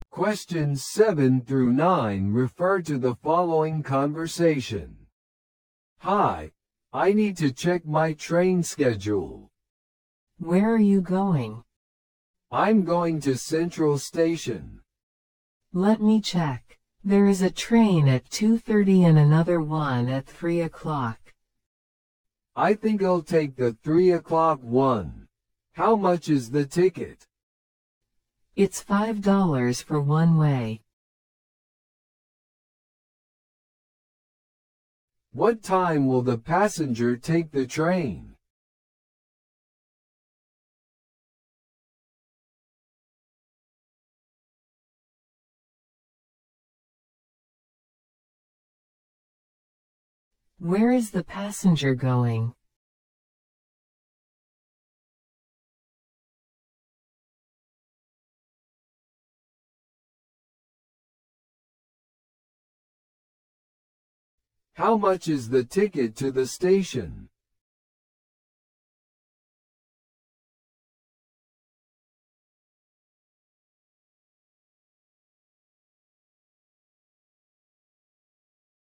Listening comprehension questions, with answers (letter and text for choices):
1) What time will the passenger take the train?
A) 2:30 PM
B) 3:00 PM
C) 3:30 PM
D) 4:00 PM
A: B) 3:00 PM

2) Where is the passenger going?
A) West Station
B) North Station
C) Central Station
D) East Station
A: C) Central Station

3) How much is the ticket to the Station?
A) $4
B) $6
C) $7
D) $5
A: D) $5

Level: 初級者用